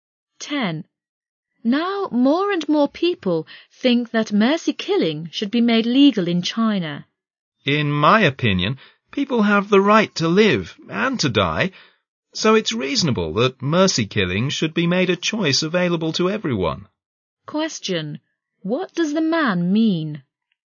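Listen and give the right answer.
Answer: He thinks mercy killing should be made legal, as a choice available to everyone.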